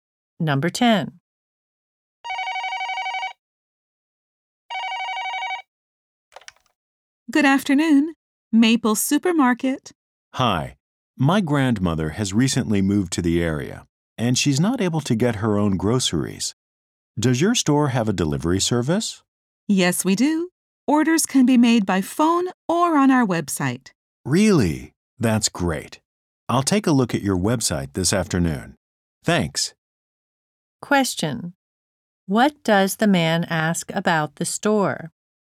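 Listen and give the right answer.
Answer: Whether it has a delivery service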